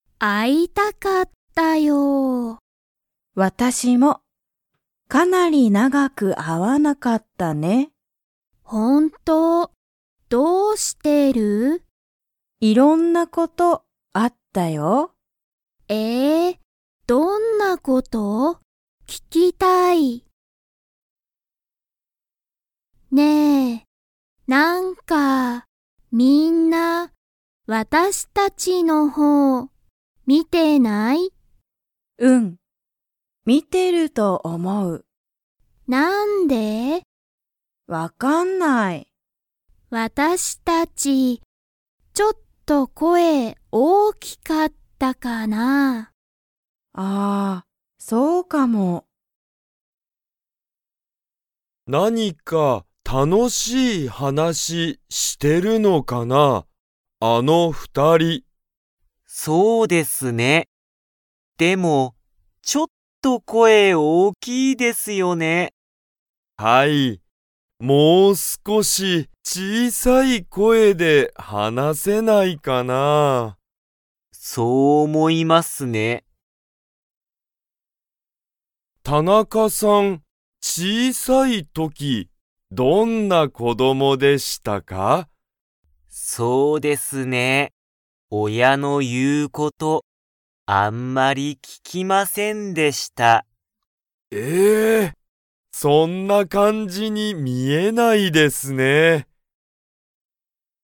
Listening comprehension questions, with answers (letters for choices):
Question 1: ナナはいろんなことがありましたか?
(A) はい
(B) いいえ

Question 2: ナナとアキは____が大(おお)きかった。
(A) 声(こえ)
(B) お店(みせ)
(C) 親(おや)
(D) 感(かん)じ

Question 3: 佐藤(さとう)さんと田中(たなか)さんは、その二人(ふたり)の声(こえ)が大(おお)きいと____。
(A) 思(おも)う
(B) 思(おも)わない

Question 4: 小(ちい)さい時(とき)、田中(たなか)さんは、誰(だれ)の言(い)うことをあんまり聞(き)きませんでしたか?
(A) 声(こえ)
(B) 親(おや)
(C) 友達(ともだち)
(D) 彼女(かのじょ)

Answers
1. A
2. A
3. A
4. B